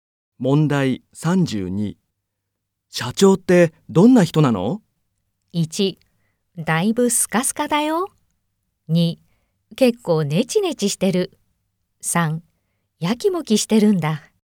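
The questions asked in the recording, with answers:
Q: 社長ってどんな人なの?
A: 2: 結構ネチネチしてる。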